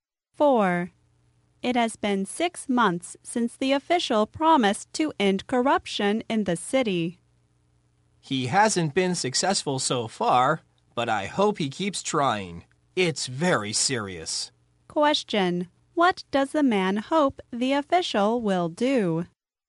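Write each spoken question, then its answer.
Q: What does the man hope the official will do?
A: Keep trying to end corruption in the city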